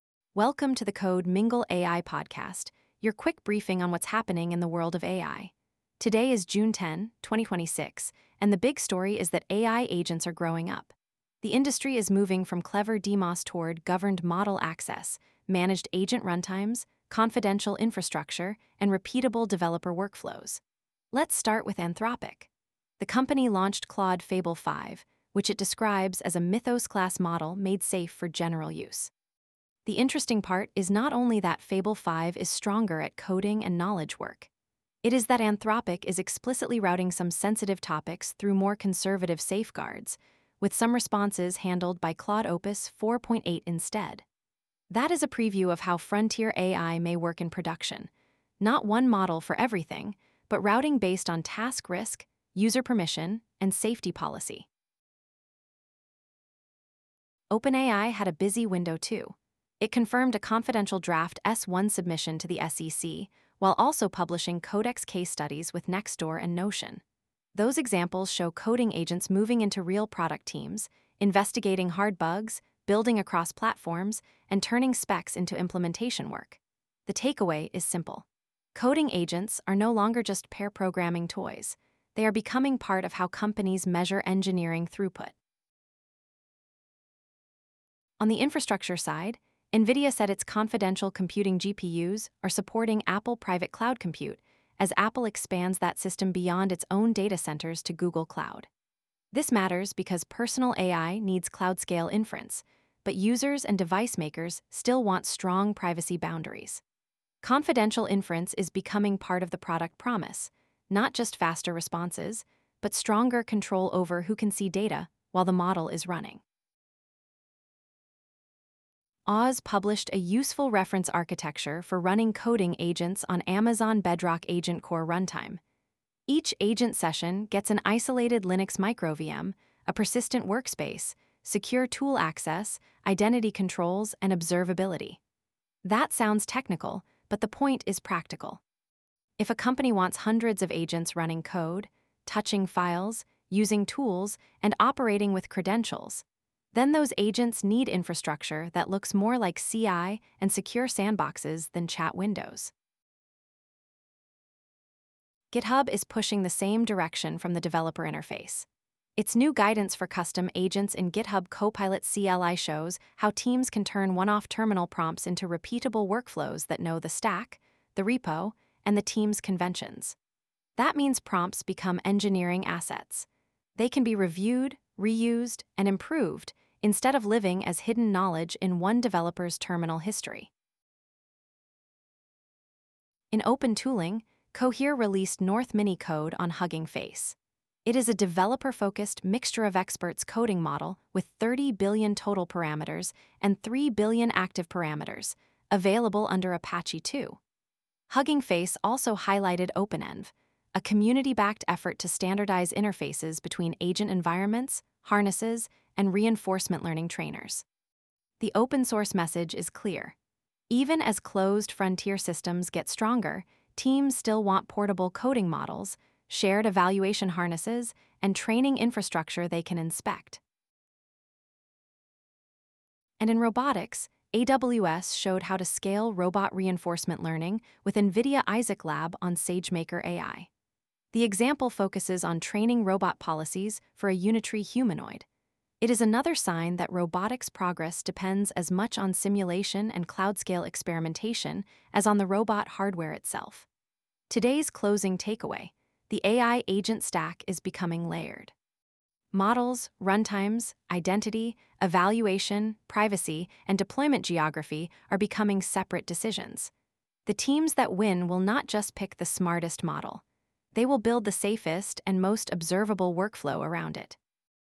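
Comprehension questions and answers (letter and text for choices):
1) What was the most important product-design signal in Anthropic's Claude Fable 5 launch?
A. Anthropic discontinued all previous Claude models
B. Anthropic paired a more capable model with safety routing and conservative fallbacks for sensitive topics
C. Anthropic released only an open-source weights package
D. Anthropic moved Claude exclusively to mobile devices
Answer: B. Anthropic paired a more capable model with safety routing and conservative fallbacks for sensitive topics

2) Why is AWS Bedrock AgentCore Runtime relevant to coding agents?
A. It replaces source control with generated patches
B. It gives each agent session an isolated microVM, persistent workspace, secure tool access, and observability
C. It trains new foundation models from scratch on every repository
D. It removes the need for code review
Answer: B. 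It gives each agent session an isolated microVM, persistent workspace, secure tool access, and observability

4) What is notable about Cohere's North Mini Code release on Hugging Face?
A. It is a developer-focused 30B-parameter Mixture-of-Experts coding model with 3B active parameters under Apache 2.0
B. It is a speech-only model for call centers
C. It is available only through a proprietary desktop IDE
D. It is a replacement for container orchestration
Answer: A. It is a developer-focused 30B-parameter Mixture-of-Experts coding model with 3B active parameters under Apache 2.0

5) What does GitHub's custom agents guidance for Copilot CLI suggest teams should do with agent behavior?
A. Keep prompts private and never review them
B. Use agents only for casual brainstorming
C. Encode stack-specific workflows into repeatable, reviewable agent instructions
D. Avoid terminal automation entirely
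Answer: C. Encode stack-specific workflows into repeatable, reviewable agent instructions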